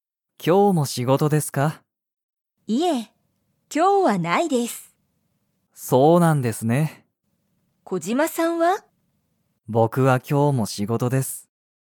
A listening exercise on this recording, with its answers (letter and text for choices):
松井まついさんは今日きょうも仕事しごとですか?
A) はい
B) いいえ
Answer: B) いいえ

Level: Level 1